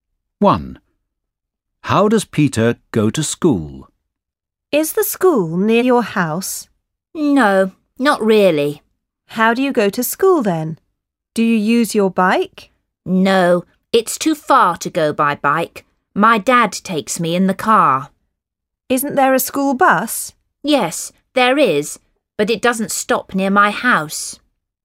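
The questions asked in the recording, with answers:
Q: How does Peter go to school?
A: By car (his dad takes him)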